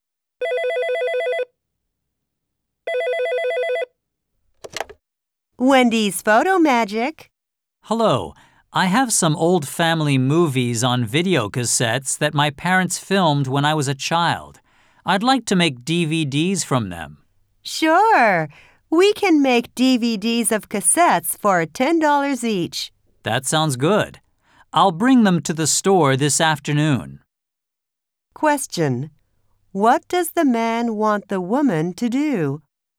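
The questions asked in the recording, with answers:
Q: What does the man want the woman to do?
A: Make DVDs from his old family movies on video cassettes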